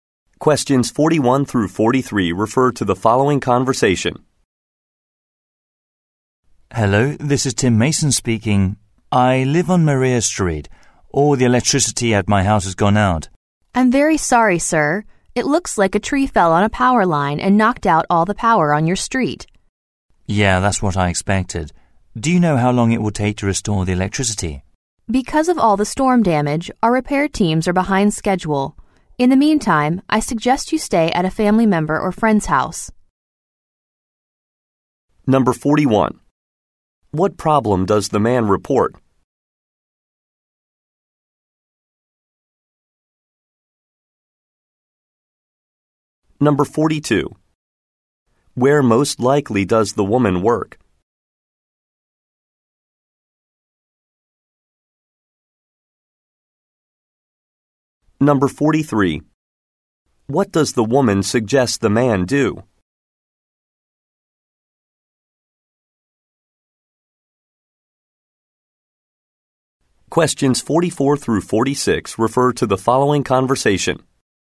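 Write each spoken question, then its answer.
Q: What problem does the man report?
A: A power outage at his house

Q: Where most likely does the woman work?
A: At an electric power company

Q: What does the woman suggest the man do?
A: Stay at a family member's or friend's house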